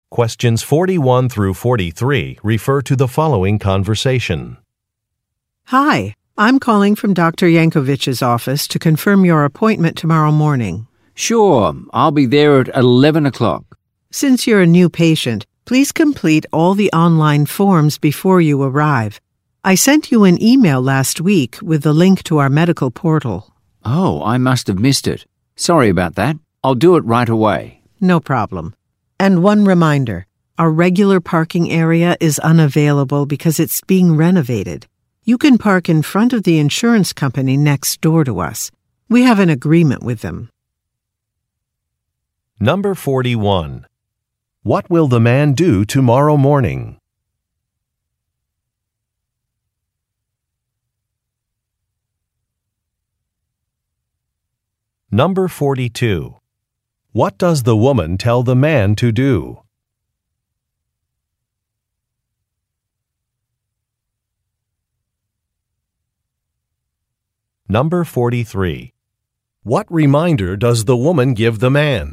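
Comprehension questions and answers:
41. What will the man do tomorrow morning?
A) Meet with a client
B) Visit a doctor's office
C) Relocate to a different office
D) Attend a presentation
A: Visit a doctor's office

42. What does the woman tell the man to do?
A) Fill in some forms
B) Update a contact number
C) Make a payment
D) Choose a menu item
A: Fill in some forms

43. What reminder does the woman give the man?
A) A colleague is out of town.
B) A price has changed.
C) Some software must be updated.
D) A parking area is closed.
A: A parking area is closed.

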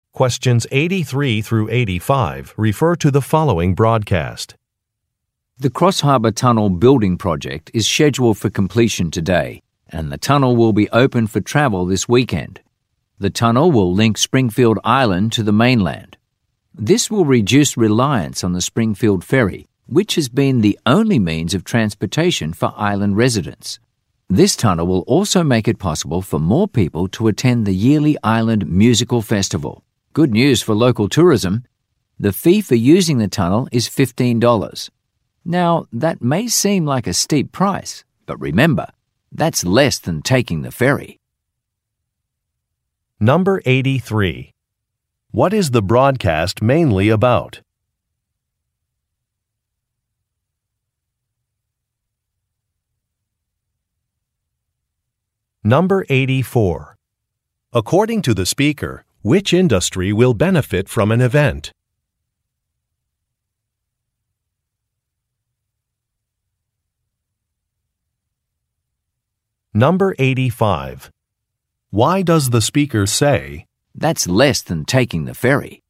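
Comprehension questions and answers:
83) What is the broadcast mainly about?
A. The announcement of a sporting competition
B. The completion of a construction project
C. The closing of a local business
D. The election of a city official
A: The completion of a construction project

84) According to the speaker, which industry will benefit from an event?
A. Technology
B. Manufacturing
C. Fishing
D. Tourism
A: Tourism

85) Why does the speaker say, "that's less than taking the ferry"?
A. To show surprise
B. To stress a disadvantage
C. To acknowledge a mistake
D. To offer a counterargument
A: To offer a counterargument

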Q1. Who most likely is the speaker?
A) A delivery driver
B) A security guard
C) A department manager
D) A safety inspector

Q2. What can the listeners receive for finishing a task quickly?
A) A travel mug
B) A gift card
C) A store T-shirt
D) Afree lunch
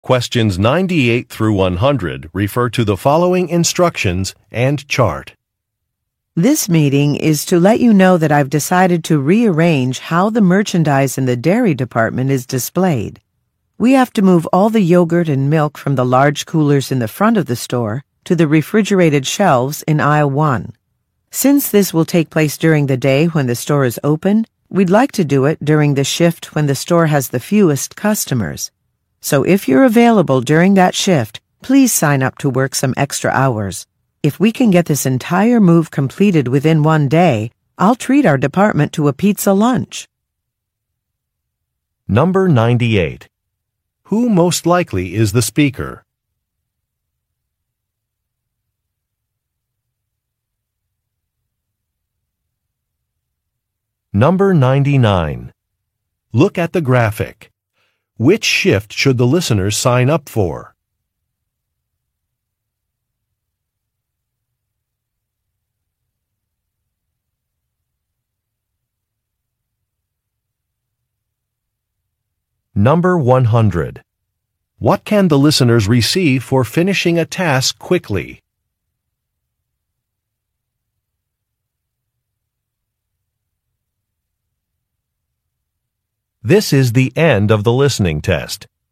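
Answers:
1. A department manager
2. Afree lunch

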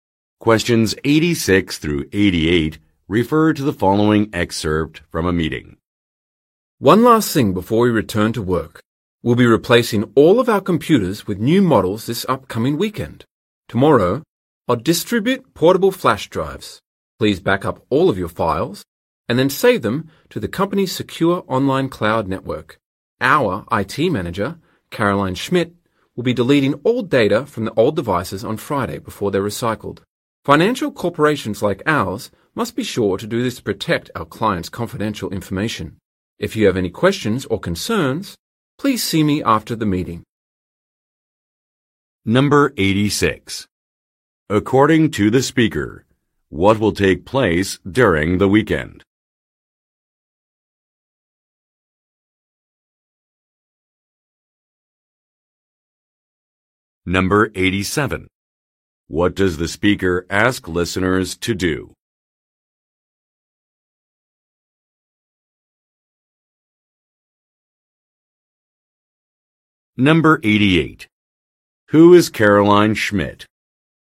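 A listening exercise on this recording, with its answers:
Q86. According to the speaker, what will take place during the weekend?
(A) A client meeting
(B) Some special tutorials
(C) Some office renovations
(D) An equipment upgrade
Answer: An equipment upgrade

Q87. What does the speaker ask listeners to do?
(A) Save some data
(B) Print out some documents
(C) Download a program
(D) Replace some desks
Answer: Save some data

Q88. Who is Caroline Schmidt?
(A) A television broadcaster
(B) A security guard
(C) A department supervisor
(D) A sales representative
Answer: A department supervisor

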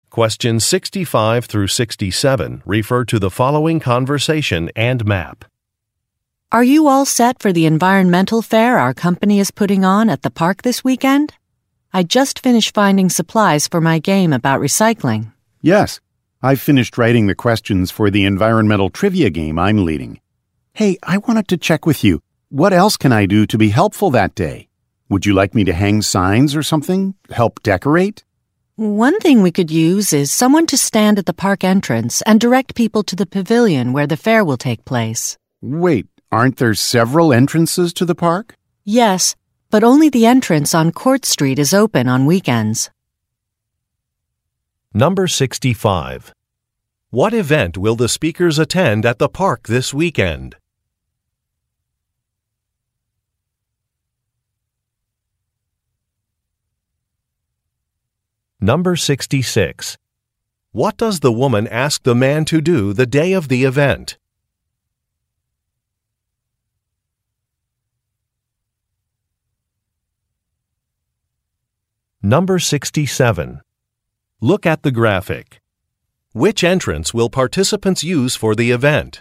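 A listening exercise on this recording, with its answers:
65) What event will the speakers attend at the park this weekend?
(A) A picnic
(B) An athletic event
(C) An environmental fair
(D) A volunteer trash cleanup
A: An environmental fair

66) What does the woman ask the man to do the day of the event?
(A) Hand out prizes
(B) Direct people where to go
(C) Decorate the park pavilion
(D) Hang up signs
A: Direct people where to go

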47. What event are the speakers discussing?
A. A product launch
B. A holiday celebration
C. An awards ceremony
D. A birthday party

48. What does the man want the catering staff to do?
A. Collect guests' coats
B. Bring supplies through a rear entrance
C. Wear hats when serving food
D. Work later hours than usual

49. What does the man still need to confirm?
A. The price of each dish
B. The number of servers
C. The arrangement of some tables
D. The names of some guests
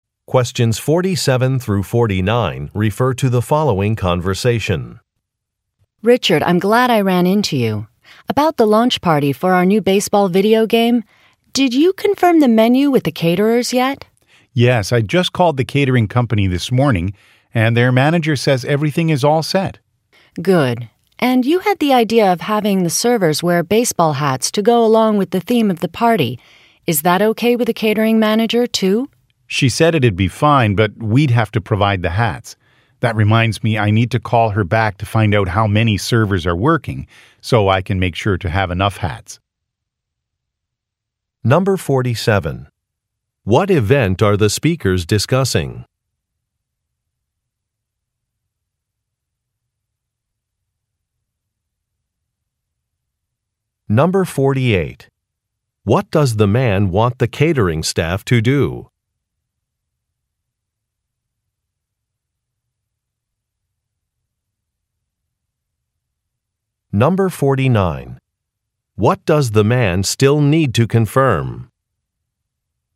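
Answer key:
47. A product launch
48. Wear hats when serving food
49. The number of servers

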